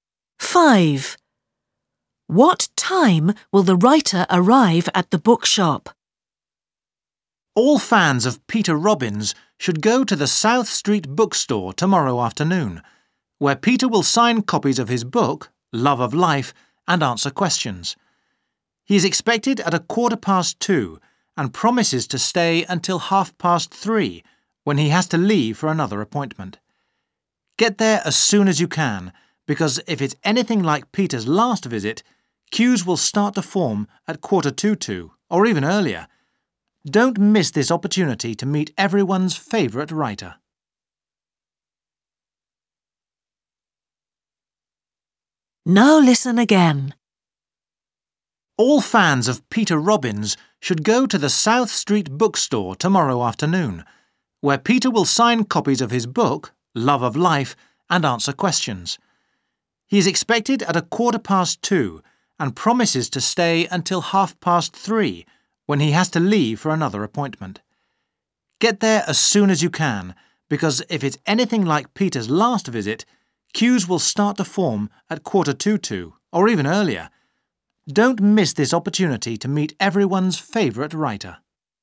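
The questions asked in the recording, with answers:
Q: What time will the writer arrive at the bookshop?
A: 2:15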